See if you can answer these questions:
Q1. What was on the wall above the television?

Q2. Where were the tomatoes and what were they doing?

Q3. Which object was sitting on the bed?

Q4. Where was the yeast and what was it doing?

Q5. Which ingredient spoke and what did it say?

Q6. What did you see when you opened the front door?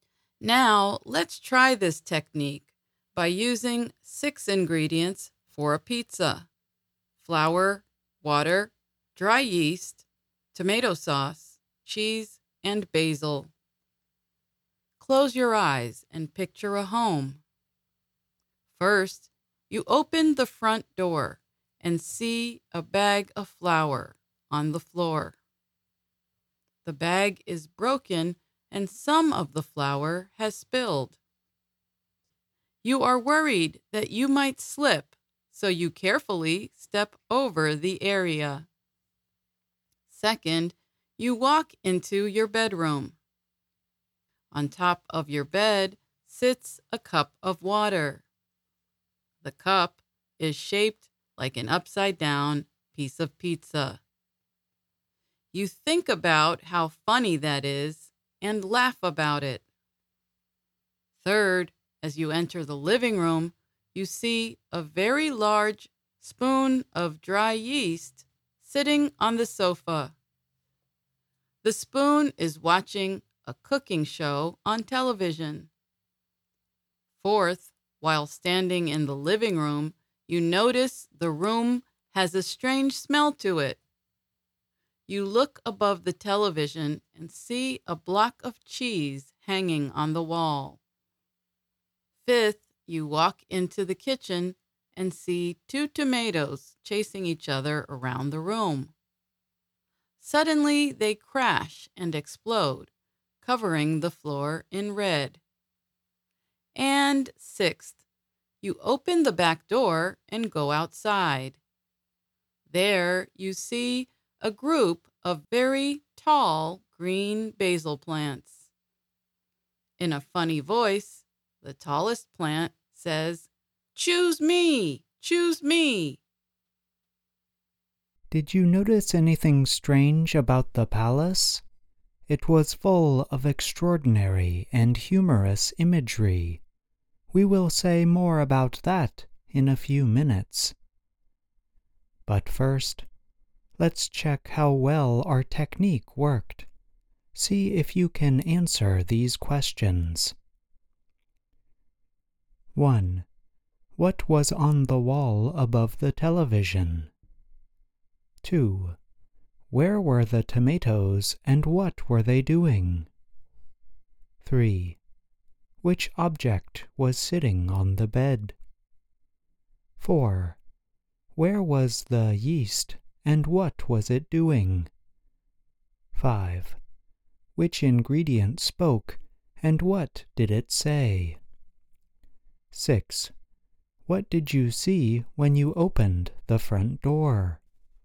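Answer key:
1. A block of cheese
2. In the kitchen, chasing each other around the room
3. A cup of water
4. On the sofa in the living room, watching a cooking show on television
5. The basil; "Choose me! Choose me!"
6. A broken bag of flour on the floor

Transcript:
As you walk through, put objects that you want to remember at specific places along the path. Leave the objects there to pick up later when you visit your memory palace.
Now, let's try this technique by using six ingredients for a pizza: flour, water, dry yeast, tomato sauce, cheese and basil.
Close your eyes and picture a home.
First, you open the front door and see a bag of flour on the floor. The bag is broken and some of the flour has spilled. You are worried that you might slip, so you carefully step over the area.
Second, you walk into your bedroom. On top of your bed sits a cup of water. The cup is shaped like an upside-down piece of pizza. 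You think about how funny that is and laugh about it.
Third, as you enter the living room, you see a very large spoon of dry yeast sitting on the sofa. The spoon is watching a cooking show on television.
Fourth, while standing in the living room, you notice the room has a strange smell to it. You look above the television and see a block of cheese hanging on the wall.
Fifth, you walk into the kitchen and see two tomatoes chasing each other around the room. Suddenly, they crash and explode, covering the floor in red.
And sixth, you open the back door and go outside. There, you see a group of very tall green basil plants. In a funny voice, the tallest plant says, "Choose me! Choose me!"
Did you notice anything strange about the palace? It was full of extraordinary and humorous imagery. We will say more about that in a few minutes.
But first, let's check how well our technique worked.
1-What was on the wall above the television?
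2-Where were the tomatoes and what were they doing?
3-Which object was sitting on the bed?
4-Where was the yeast and what was it doing?
5-Which ingredient spoke and what did it say?
6-What did you see when you opened the front door?
My guess is that you remembered everything in our memory palace. That's good news.
Make memory strong
Experts offer some advice for making strong memory palaces.
For instance, if you want to remember a lot of words, memory trainer Anthony Metivier suggests first drawing a simple map of your memory palace.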